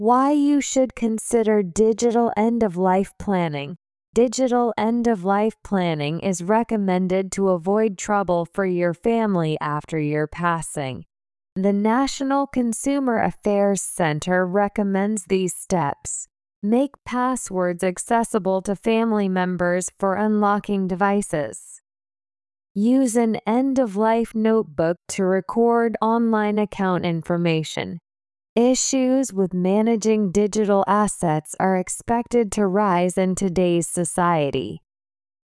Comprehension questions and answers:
次の各質問の答えを探しながら聞きましょう。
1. Who recommends digital end-of-life planning?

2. How can families avoid trouble after you pass away?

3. Where can people record their online account information?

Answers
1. The National Consumer Affairs Center.
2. By planning your digital end-of-life.
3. In an end-of-life notebook.

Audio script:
Why You Should Consider Digital End-of-Life Planning
"Digital end-of-life planning" is recommended to avoid trouble for your family after your passing.
The National Consumer Affairs Center recommends these steps:
Make passwords accessible to family members for unlocking devices.
Use an end-of-life notebook to record online account information.
Issues with managing digital assets are expected to rise in today's society.

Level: 中級脱出